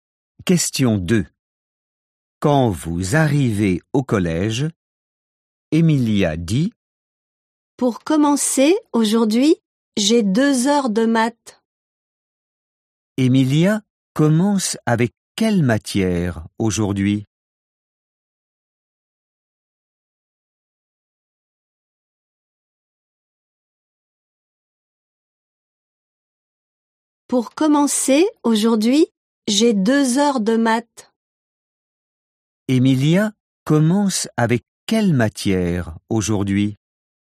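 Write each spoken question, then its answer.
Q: Emilia commence avec quelle matière aujourd'hui ?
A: Les maths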